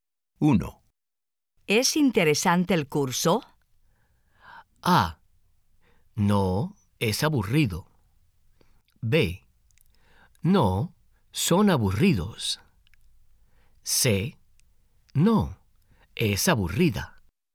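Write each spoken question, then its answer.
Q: ¿Es interesante el curso?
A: A: No, es aburrido.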